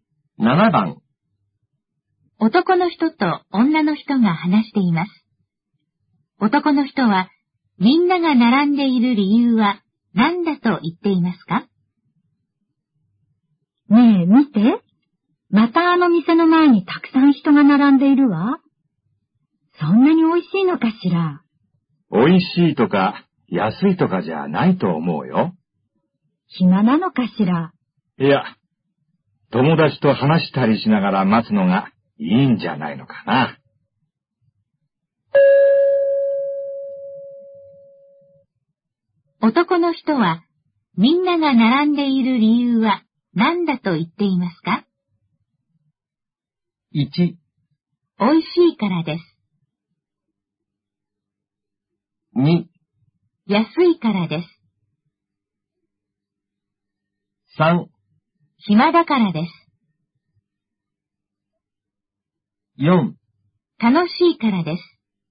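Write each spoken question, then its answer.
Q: 男の人は、みんなが並んでいる理由は何だと言っていますか?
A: 4: 楽しいからです。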